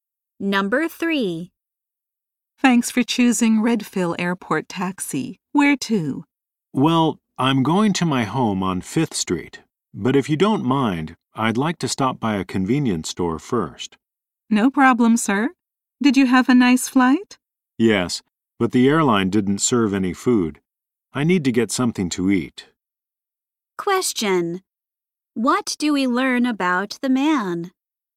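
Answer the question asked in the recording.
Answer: He is hungry and wants to stop at a convenience store.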